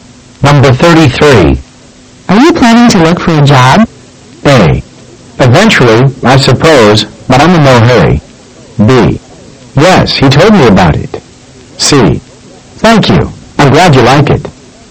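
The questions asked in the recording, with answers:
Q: Are you planning to look for a job?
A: A: Eventually, I suppose, but I'm in no hurry.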